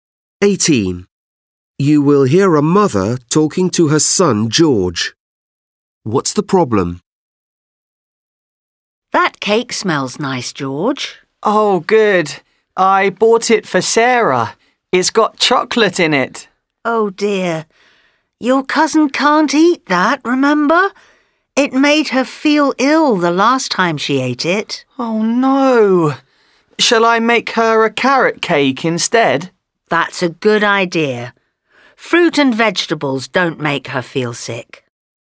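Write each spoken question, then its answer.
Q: What's the problem?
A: The cake has chocolate in it, which makes his cousin Sarah ill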